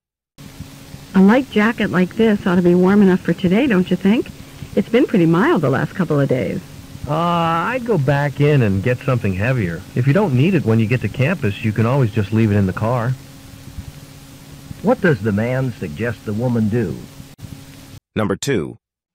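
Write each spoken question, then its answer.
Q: What does the man suggest the woman do?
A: Go back in and get a heavier jacket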